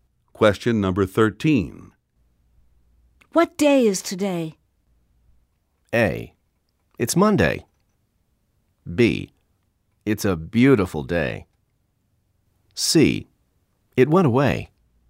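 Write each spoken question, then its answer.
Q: What day is today?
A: A: It's Monday.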